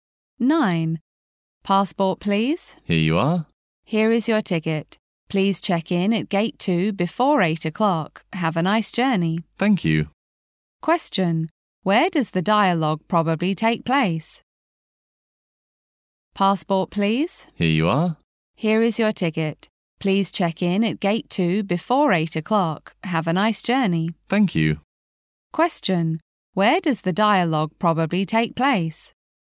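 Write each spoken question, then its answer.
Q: Where does the dialogue probably take place?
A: At an airport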